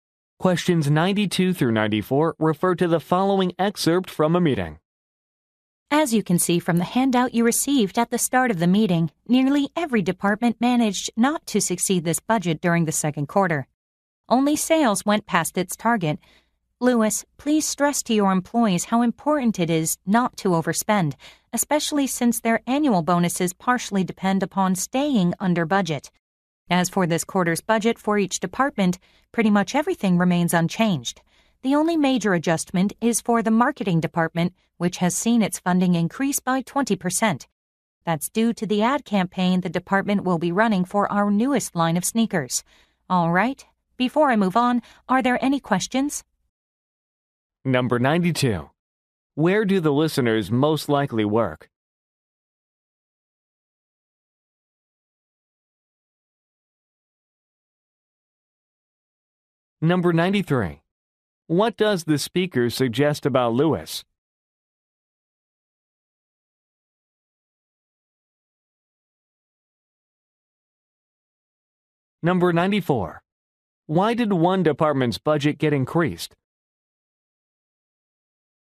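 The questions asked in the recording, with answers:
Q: Why did one department's budget get increased?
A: For an ad campaign for a new line of sneakers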